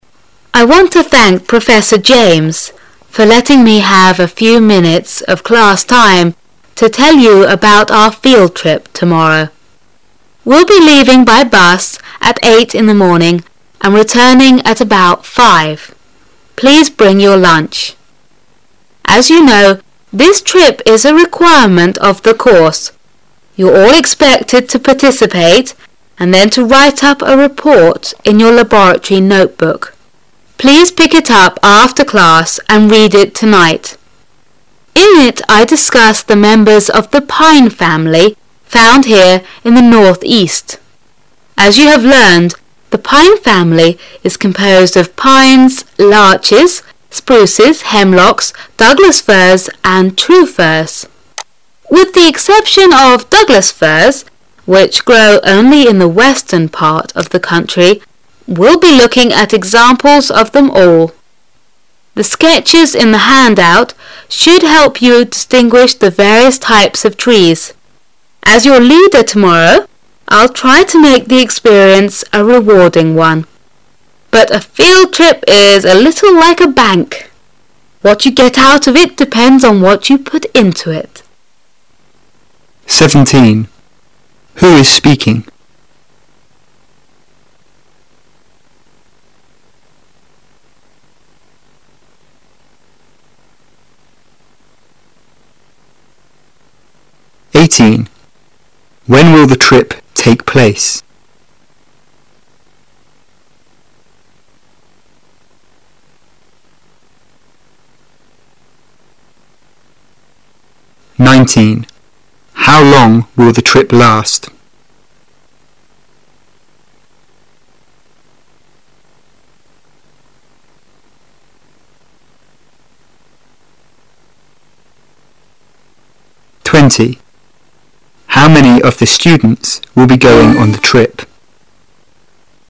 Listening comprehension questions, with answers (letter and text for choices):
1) When will the trip take place?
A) After the laboratory period.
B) The following day.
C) The following week.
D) After class.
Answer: B) The following day.

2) How long will the trip last?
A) Until lunchtime.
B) All day.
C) The whole weekend.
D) Five hours.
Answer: B) All day.

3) How many of the students will be going on the trip?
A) Only those who want to.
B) Only those from the Northeast.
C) All of those who are not presenting reports.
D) All of them.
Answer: D) All of them.

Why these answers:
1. 明示细节题,由第一段第一句话可以听出。
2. 隐含细节题,由第一段第二句可推出旅行只有一天。
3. 隐含细节题,由第二段"...you're all expected to participate and..."可推出答案。

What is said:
[解析] 17-20 I want to thank Professor James for letting me have a few minutes of class time to tell about our field trip tomorrow. We'll be leaving by bus at eight in the morning and returning at about five, Please bring your lunch. As you know, this trip is a requirement of the course, you're all expected to participate and then to write up a report in your laboratory notebook, rye put together a handout to orient you. Please pick it up after class and read it tonight. In it I discuss the members of the pine family found here in the Northeast. As you have learned, the pine family is composed of pines, larches, spruces, hemlocks, Douglas firs, and true firs. With the exception of Douglas firs, which grow only in the western part of the country, we'll be looking at examples of them all. The sketches in the handout should help you distinguish the various types of trees. As your leader tomorrow, I'll try to make the experience a rewarding one. But a field trip is a little like a bank., what you get out of it depends on what you put into it.